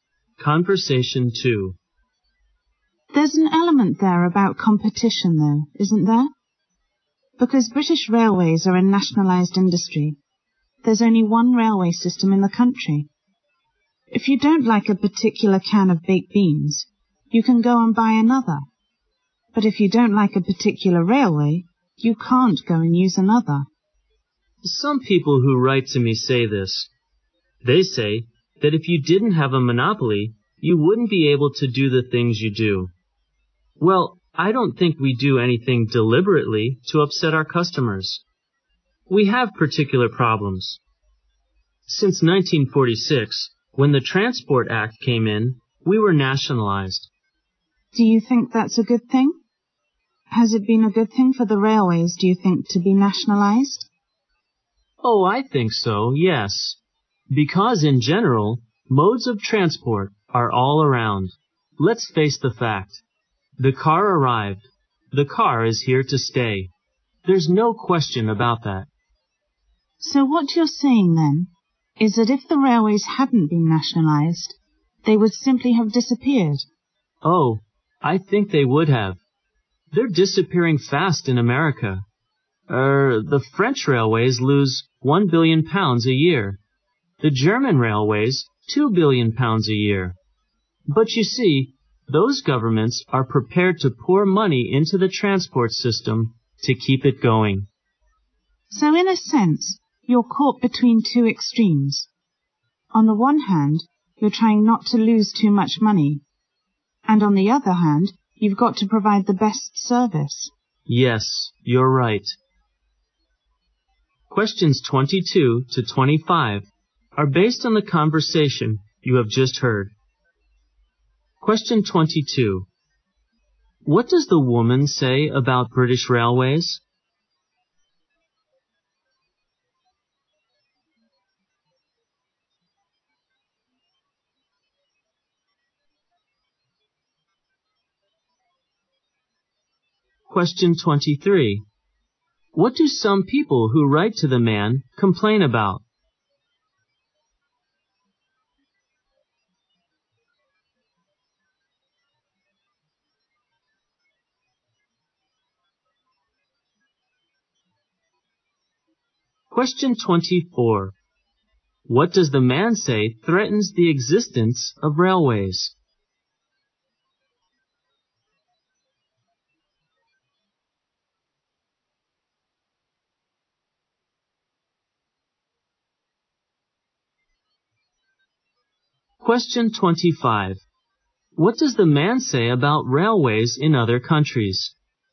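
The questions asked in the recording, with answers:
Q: What does the woman say about British Railways?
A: It is nationalized, with only one railway system and no competition.

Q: What do some people who write to the man complain about?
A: The railway's monopoly.

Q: What does the man say threatens the existence of railways?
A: The car.

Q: What does the man say about railways in other countries?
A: They lose a lot of money, but their governments fund them.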